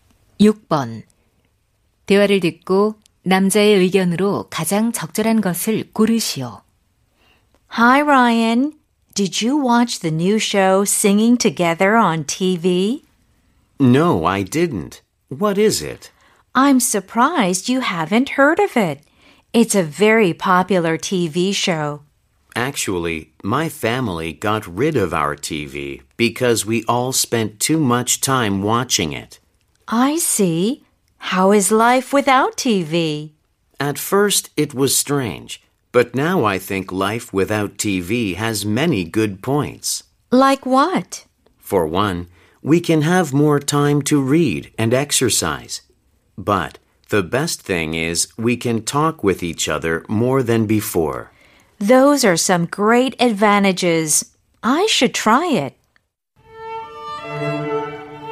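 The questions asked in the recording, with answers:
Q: 대화를 듣고 남자의 의견으로 가장 적절한 것을 고르시오.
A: TV 없는 생활은 장점이 많다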